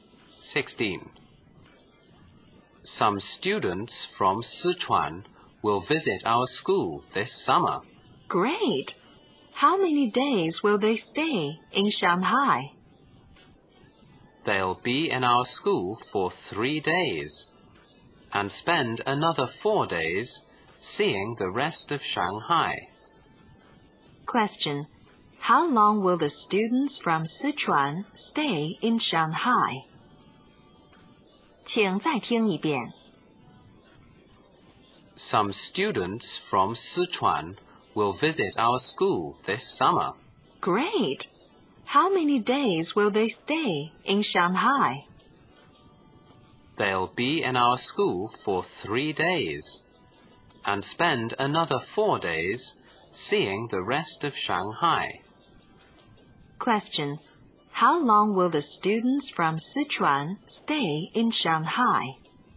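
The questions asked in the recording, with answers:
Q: How long will the students from Sichuan stay in Shanghai?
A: 7 days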